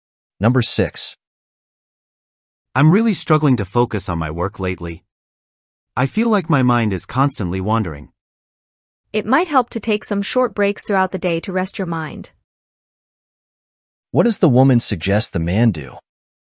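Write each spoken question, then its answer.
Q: What does the woman suggest the man do?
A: Take short breaks during the day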